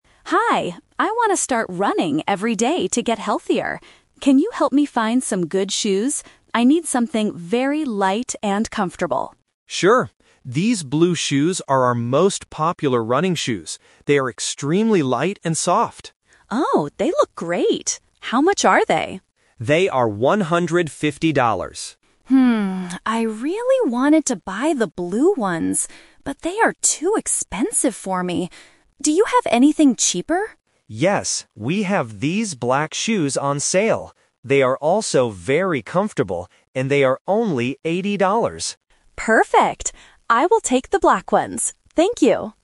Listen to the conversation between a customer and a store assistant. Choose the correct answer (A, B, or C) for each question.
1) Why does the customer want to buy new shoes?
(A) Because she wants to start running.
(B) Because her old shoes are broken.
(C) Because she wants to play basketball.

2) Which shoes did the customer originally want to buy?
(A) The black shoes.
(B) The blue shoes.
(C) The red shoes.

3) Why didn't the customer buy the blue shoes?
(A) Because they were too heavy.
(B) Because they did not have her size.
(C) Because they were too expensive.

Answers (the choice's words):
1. Because she wants to start running.
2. The blue shoes.
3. Because they were too expensive.

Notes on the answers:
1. The customer clearly says at the beginning: "I want to start running every day". Option (B) is a plausible reason to buy shoes, but it is not mentioned. Option (C) is a trap; it is a sport, but she specifically mentions running.
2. The customer says, "I really wanted to buy the blue ones, but...". Option (A) is a trap; the black shoes are the ones she decides to buy at the end, not her original choice. Option (C) is never mentioned.
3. The customer explains her reason: "but they are too expensive for me." (They cost $150). Option (A) is a trap; the assistant actually says the blue shoes are "extremely light". Option (B) is a plausible reason for not buying shoes in a store, but it is not mentioned in the audio.

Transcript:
Customer: Hi, I want to start running every day to get healthier. Can you help me find some good shoes? I need something very light and comfortable.
Assistant: Sure! These blue shoes are our most popular running shoes. They are extremely light and soft.
Customer: Oh, they look great. How much are they?
Assistant: They are $150.
I really wanted to buy the blue ones, but they are too expensive for me. Do you have anything cheaper?
Assistant: Yes, we have these black shoes on sale. They are also very comfortable, and they are only $80.